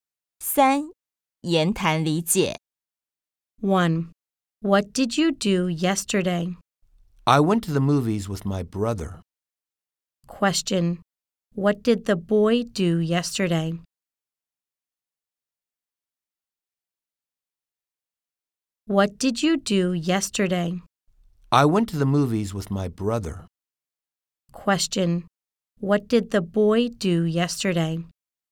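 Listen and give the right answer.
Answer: He went to the movies with his brother.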